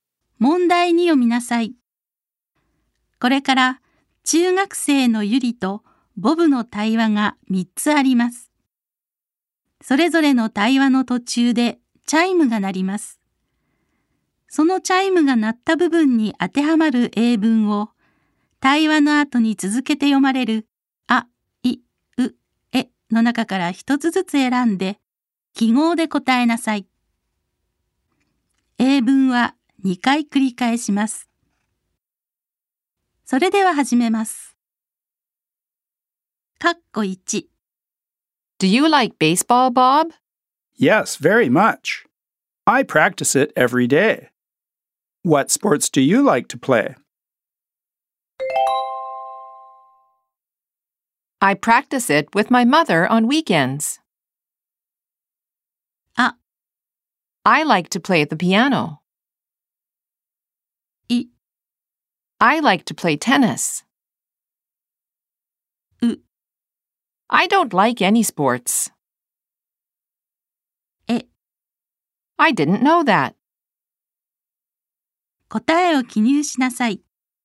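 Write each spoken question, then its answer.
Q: What sports do you like to play?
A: い: I like to play tennis.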